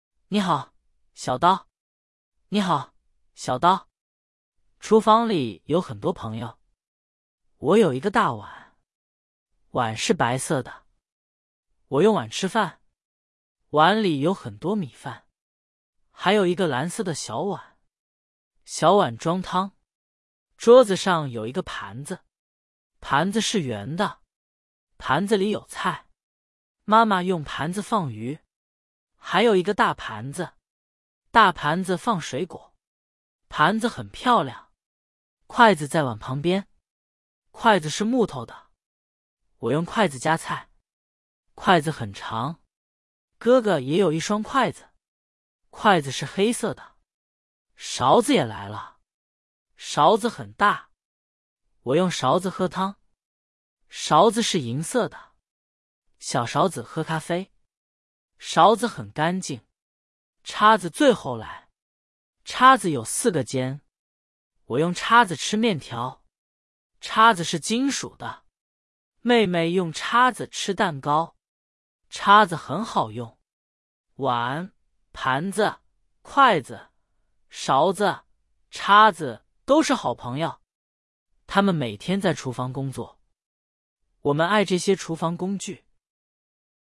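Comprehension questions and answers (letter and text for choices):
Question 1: 碗是做什么用的?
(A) 喝汤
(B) 吃饭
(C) 放水果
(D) 吃面条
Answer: (B) 吃饭

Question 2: 盘子里有什么?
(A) 米饭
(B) 汤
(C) 菜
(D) 咖啡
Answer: (C) 菜

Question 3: 筷子是什么材质的?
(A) 金属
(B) 木头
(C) 塑料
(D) 玻璃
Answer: (B) 木头

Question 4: 谁用盘子放鱼?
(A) 哥哥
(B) 妹妹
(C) 妈妈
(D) 我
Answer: (C) 妈妈

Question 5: 小勺子喝什么?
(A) 汤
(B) 水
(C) 咖啡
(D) 牛奶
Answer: (C) 咖啡

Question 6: 叉子有几个尖?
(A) 两个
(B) 三个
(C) 四个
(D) 五个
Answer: (C) 四个

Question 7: 碗是蓝色的。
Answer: 错(大碗是白色的)

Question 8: 盘子是圆的。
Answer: 对

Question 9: 筷子很长。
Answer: 对

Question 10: 勺子很大。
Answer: 对

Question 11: 叉子是木头的。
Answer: 错

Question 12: 厨房工具每天工作。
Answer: 对

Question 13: 厨房里有什么?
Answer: 很多朋友(碗、盘子、筷子、勺子、叉子)

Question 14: 碗是什么颜色的?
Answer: 白色的

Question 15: 我用什么喝汤?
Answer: 勺子

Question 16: 谁用叉子吃蛋糕?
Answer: 妹妹

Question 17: 这些厨房工具每天做什么?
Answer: 在厨房工作

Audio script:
你好, 小刀
你好,小刀。厨房里有很多朋友。我有一个大碗。碗是白色的。我用碗吃饭。碗里有很多米饭。还有一个蓝色的小碗。小碗装汤。
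桌子上有一个盘子。盘子是圆的。盘子里有菜。妈妈用盘子放鱼。还有一个大盘子。大盘子放水果。盘子很漂亮。
筷子在碗旁边。筷子是木头的。我用筷子夹菜。筷子很长。哥哥也有一双筷子。筷子是黑色的。
勺子也来了。勺子很大。我用勺子喝汤。勺子是银色的。小勺子喝咖啡。勺子很干净。
叉子最后来。叉子有四个尖。我用叉子吃面条。叉子是金属的。妹妹用叉子吃蛋糕。叉子很好用。
碗、盘子、筷子、勺子、叉子都是好朋友。他们每天在厨房工作。我们爱这些厨房工具。

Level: Beginner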